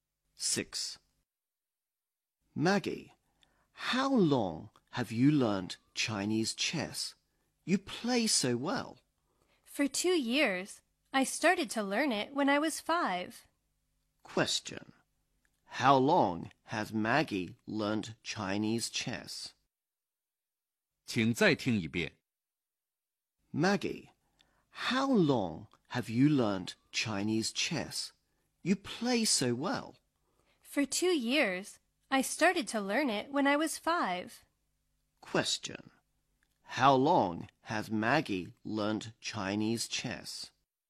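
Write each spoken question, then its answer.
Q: How long has Maggie learned Chinese chess?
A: For 2 years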